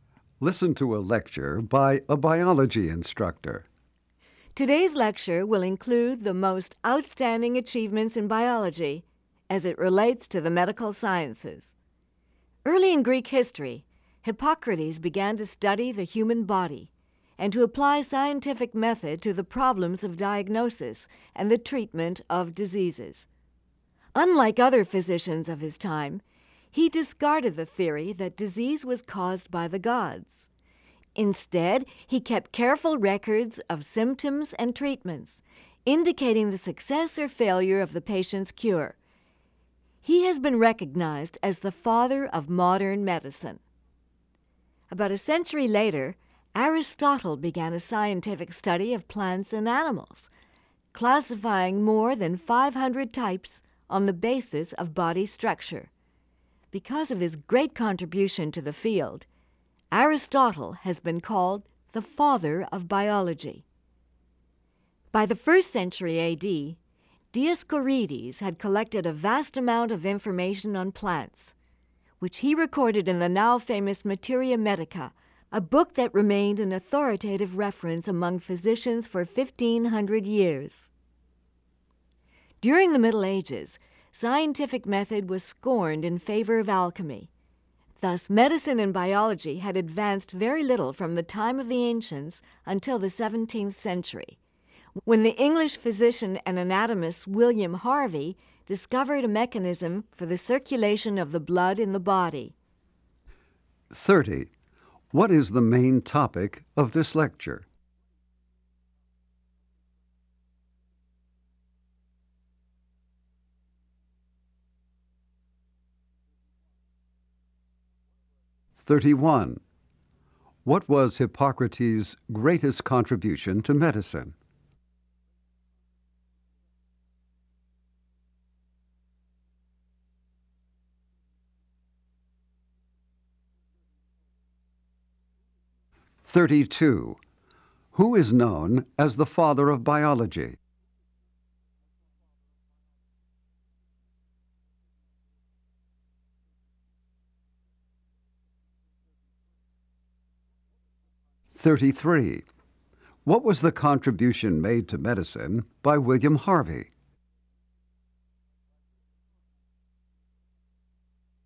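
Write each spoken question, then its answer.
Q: What is the main topic of this lecture?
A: Major achievements in biology related to medicine

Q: What was Hippocrates' greatest contribution to medicine?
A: He applied scientific method to diagnosing and treating disease

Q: Who is known as the father of biology?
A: Aristotle

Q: What was the contribution made to medicine by William Harvey?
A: He discovered how blood circulates in the body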